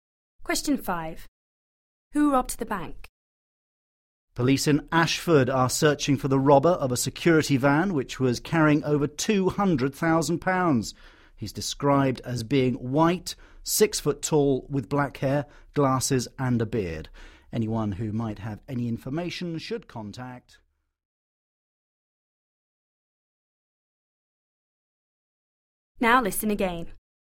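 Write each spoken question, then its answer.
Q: Who robbed the bank?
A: A tall white man with black hair, glasses and a beard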